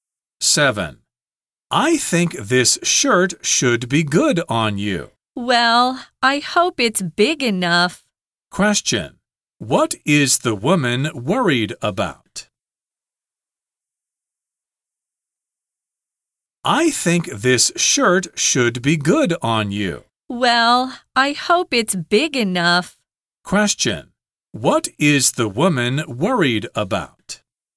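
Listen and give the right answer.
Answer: Whether the shirt is big enough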